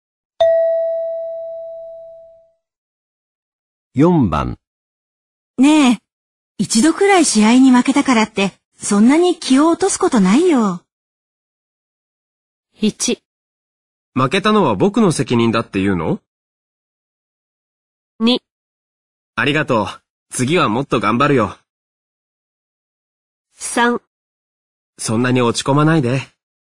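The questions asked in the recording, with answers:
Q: ねえ、一度くらい試合に負けたからって、そんなに気を落とすことないよ。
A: 2: ありがとう。次はもっと頑張るよ。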